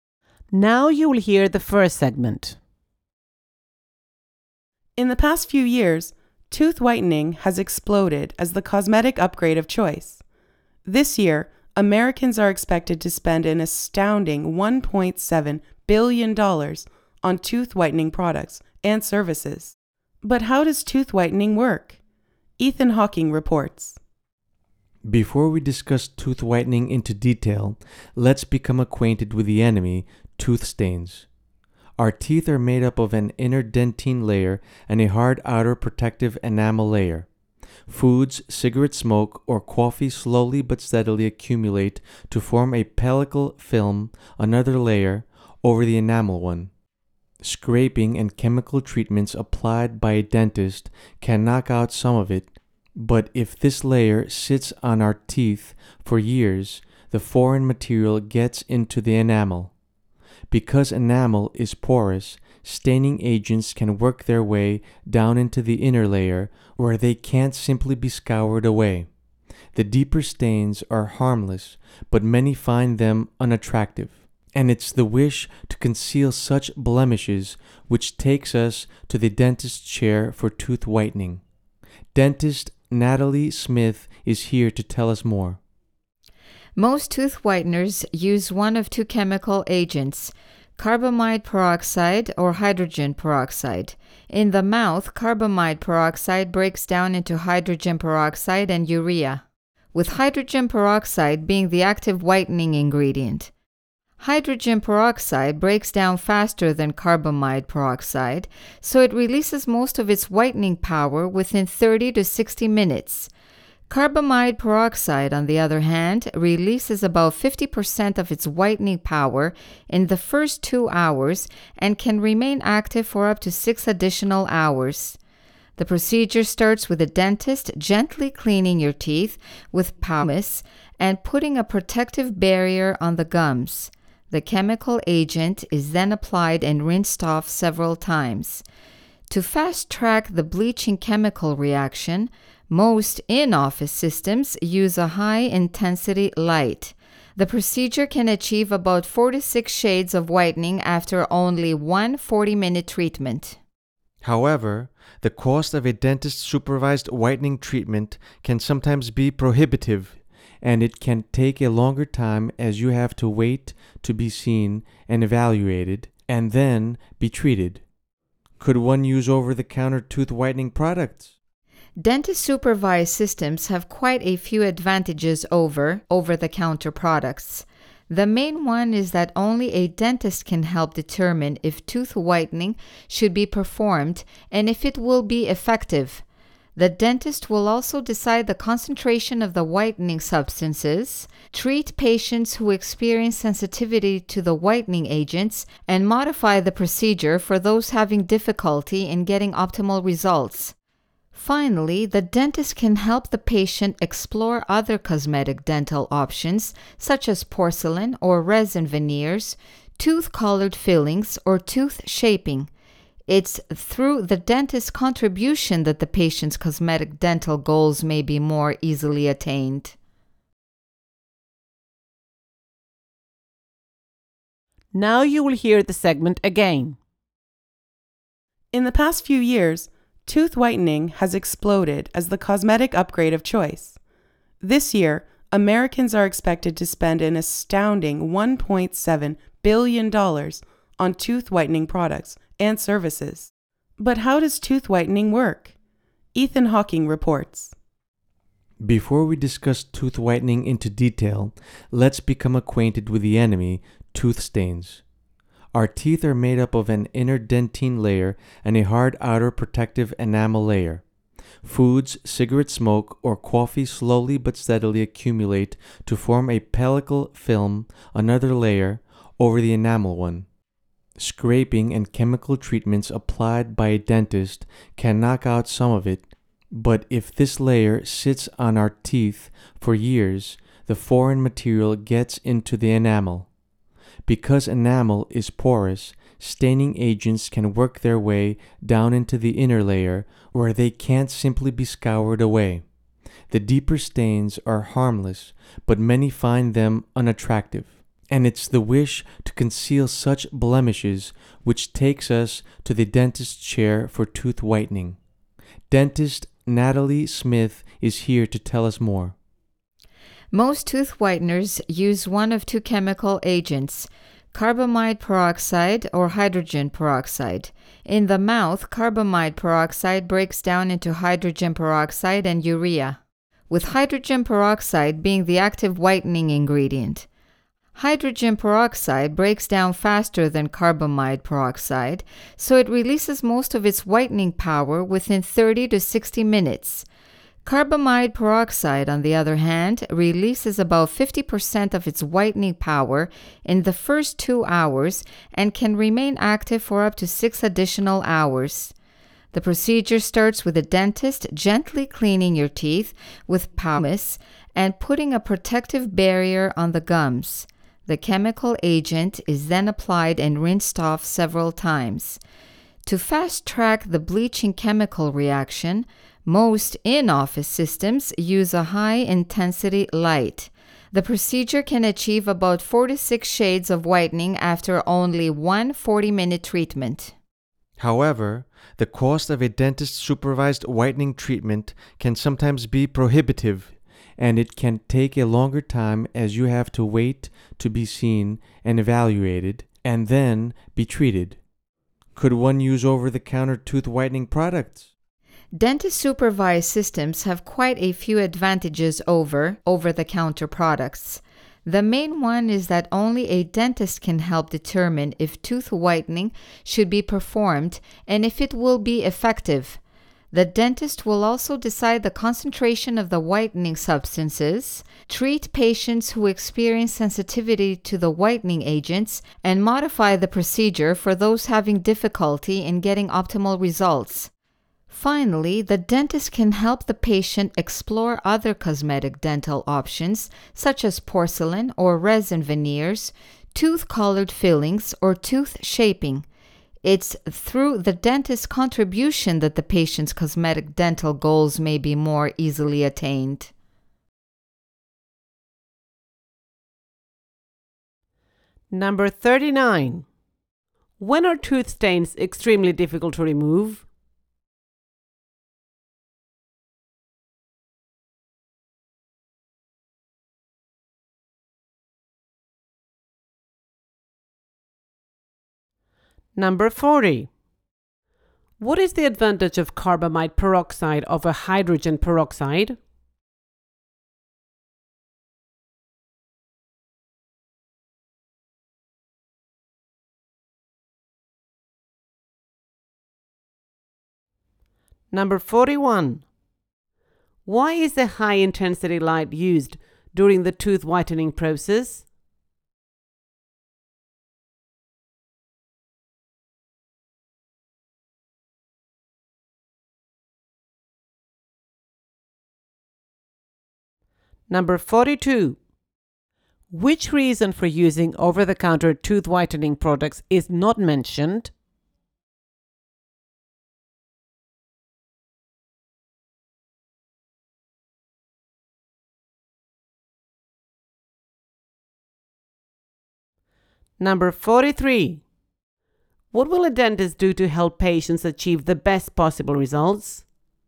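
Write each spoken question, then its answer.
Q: When are tooth stains extremely difficult to remove?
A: When the stain layer has stayed on the teeth for years and staining agents have got through the enamel into the inner layer

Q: What is the advantage of carbamide peroxide over hydrogen peroxide?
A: It stays active longer, for up to 6 more hours

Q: Why is the high intensity light used during the tooth whitening process?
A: To speed up the bleaching chemical reaction

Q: What will a dentist do to help patients achieve the best possible results?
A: Change the procedure for patients who have difficulty getting good results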